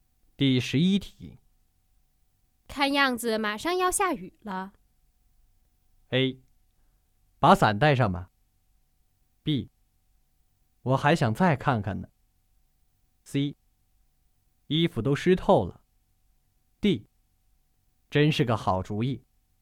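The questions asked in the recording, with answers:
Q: 看样子马上要下雨了。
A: A: 把伞带上吧。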